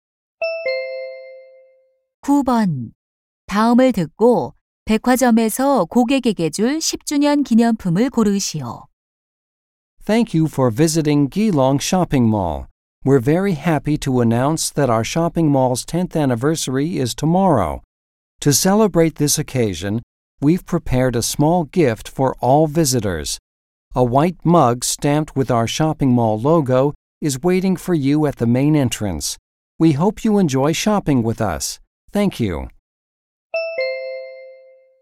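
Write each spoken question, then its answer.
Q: 다음을 듣고 백화점에서 고객에게 줄 10주년 기념품을 고르시오.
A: 로고가 찍힌 흰색 머그컵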